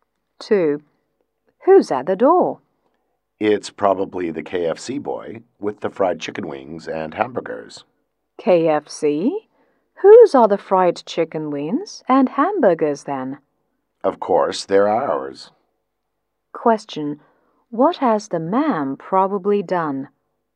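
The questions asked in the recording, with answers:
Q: What has the man probably done?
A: Ordered food from KFC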